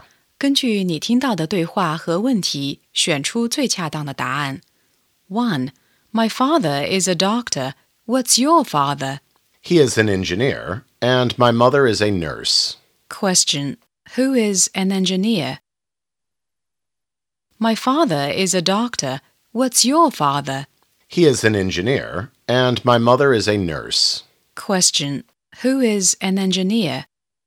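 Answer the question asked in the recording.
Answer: The second speaker's father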